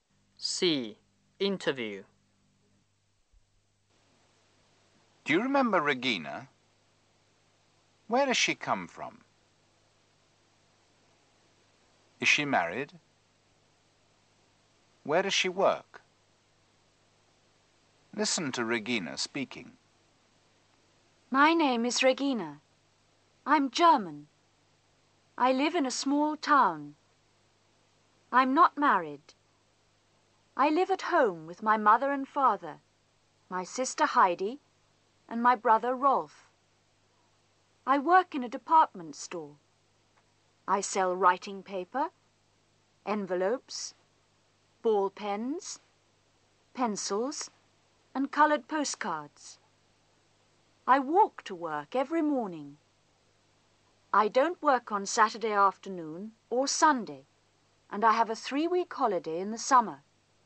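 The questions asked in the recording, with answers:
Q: Where does she come from?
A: Germany (she's German)

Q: Is she married?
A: No

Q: Where does she work?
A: In a department store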